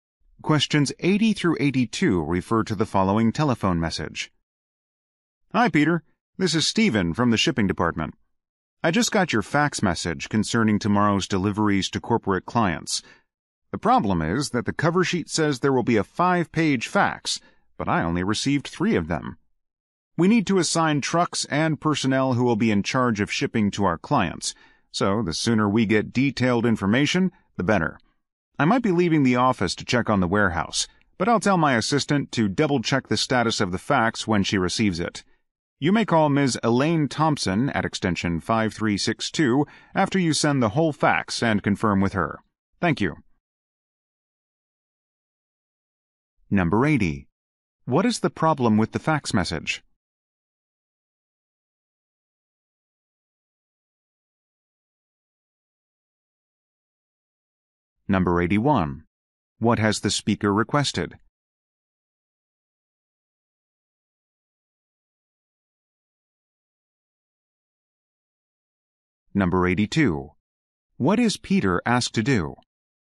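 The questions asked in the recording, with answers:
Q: What is the problem with the fax message?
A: Only 3 of 5 pages were received

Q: What has the speaker requested?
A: Detailed delivery information as soon as possible

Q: What is Peter asked to do?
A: Call Elaine Thompson after sending the whole fax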